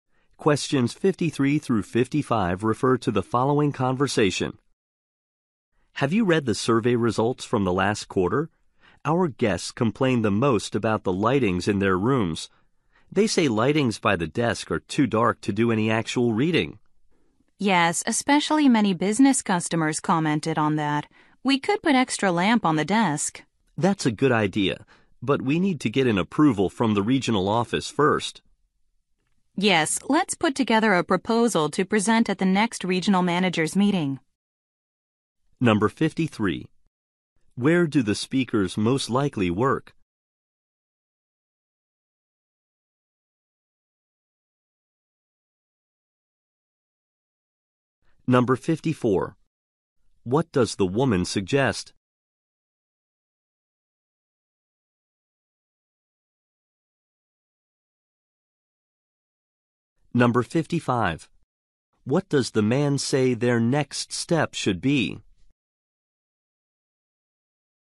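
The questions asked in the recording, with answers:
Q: Where do the speakers most likely work?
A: At a hotel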